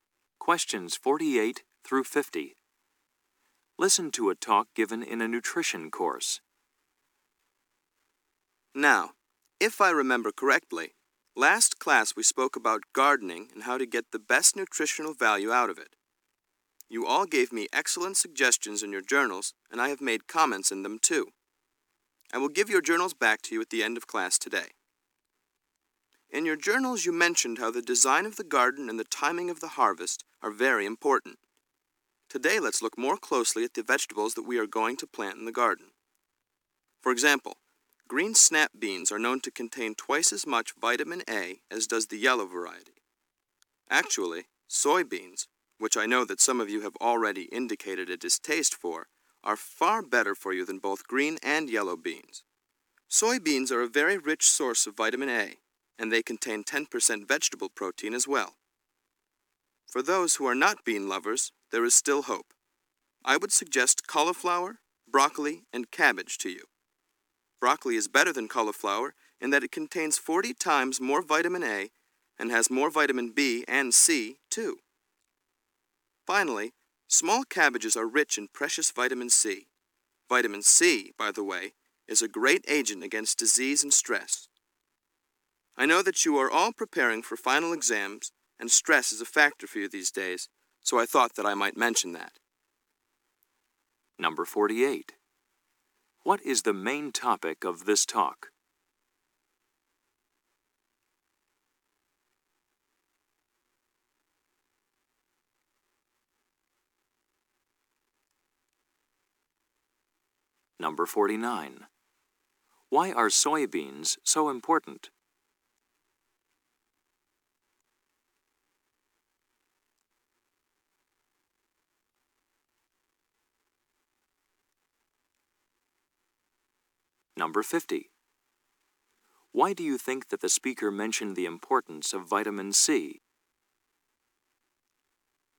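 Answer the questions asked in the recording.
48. The nutritional value of vegetables for the garden
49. They are rich in vitamin A and contain 10% vegetable protein
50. Students are stressed preparing for final exams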